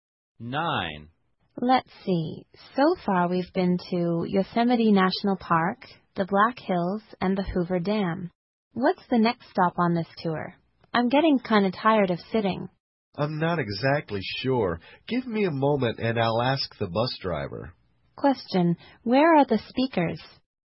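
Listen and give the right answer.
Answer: On a tour bus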